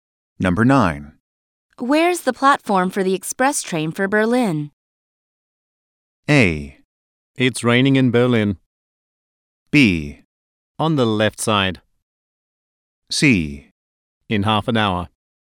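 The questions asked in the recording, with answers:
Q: Where's the platform for the express train for Berlin?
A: B: On the left side.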